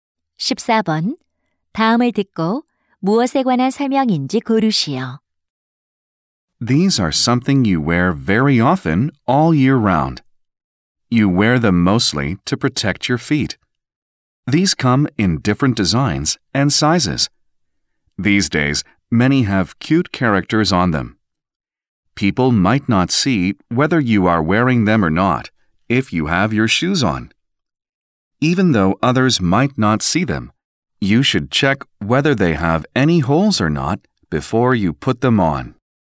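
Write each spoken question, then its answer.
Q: 다음을 듣고 무엇에 관한 설명인지 고르시오.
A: 양말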